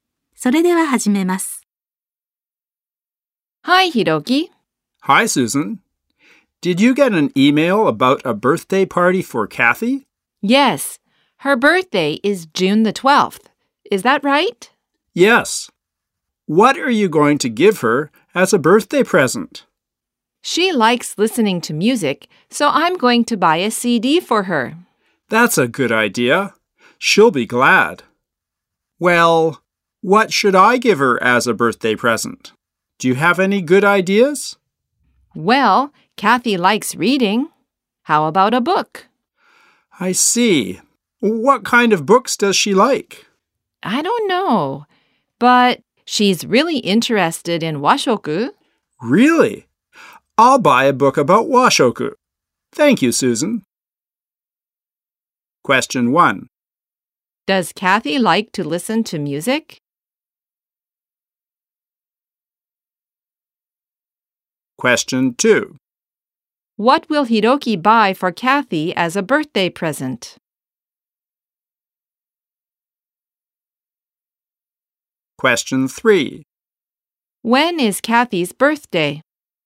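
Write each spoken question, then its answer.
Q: Does Kathy like to listen to music?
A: Yes, she does.

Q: What will Hiroki buy for Kathy as a birthday present?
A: A book about washoku.

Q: When is Kathy's birthday?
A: June 12th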